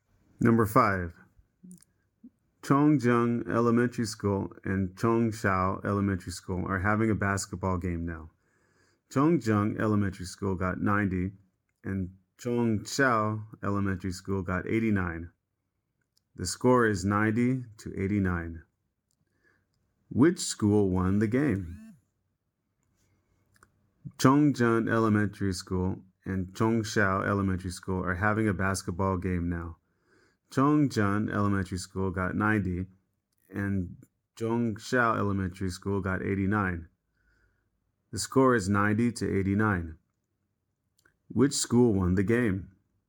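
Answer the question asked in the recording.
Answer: Chongjiang Elementary School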